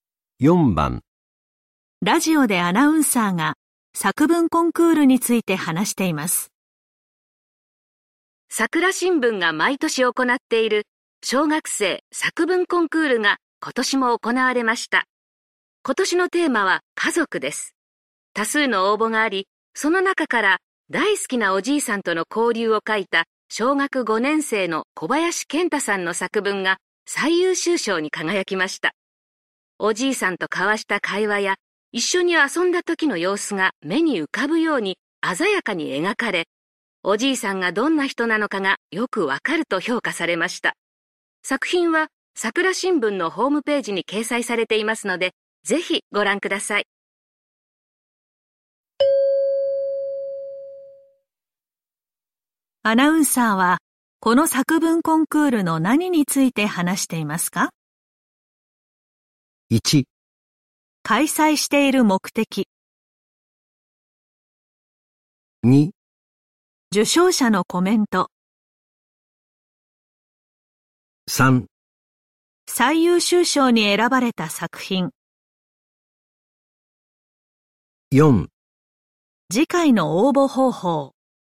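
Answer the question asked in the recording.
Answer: 3: 最優秀賞に選ばれた作品。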